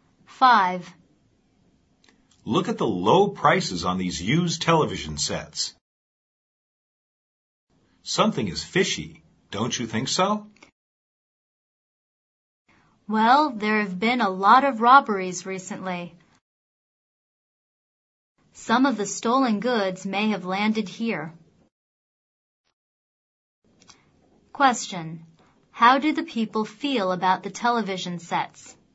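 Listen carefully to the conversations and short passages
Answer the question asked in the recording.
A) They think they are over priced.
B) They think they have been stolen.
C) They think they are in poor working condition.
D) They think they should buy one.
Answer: B) They think they have been stolen.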